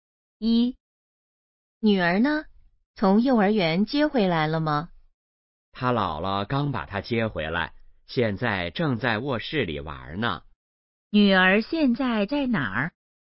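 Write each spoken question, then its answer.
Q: 女儿现在在哪儿?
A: 在卧室里玩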